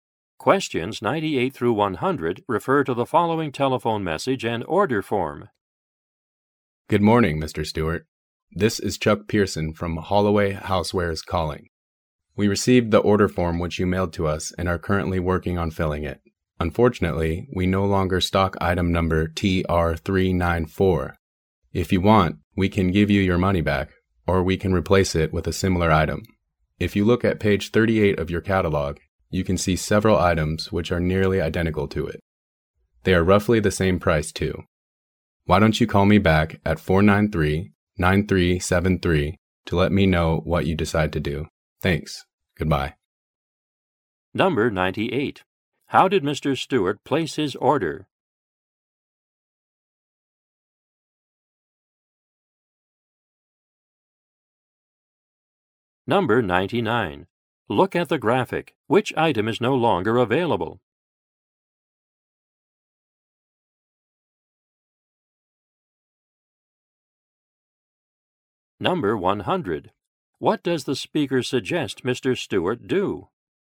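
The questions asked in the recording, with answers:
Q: How did Mr. Stewart place his order?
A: By mail

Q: What does the speaker suggest Mr. Stewart do?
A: Call him back with his decision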